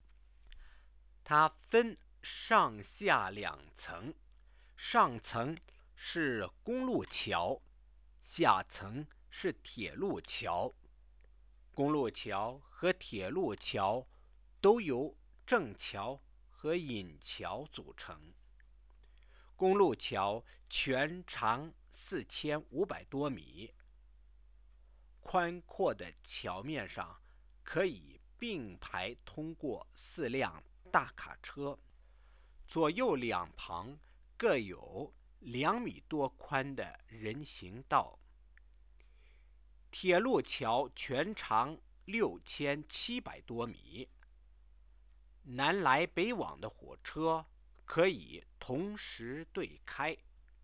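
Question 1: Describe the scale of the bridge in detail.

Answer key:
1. Two decks: road bridge above (over 4500 m long, four trucks abreast, 2 m+ walkways each side), railway bridge below (over 6700 m long, trains can run both ways at once).

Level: 2nd year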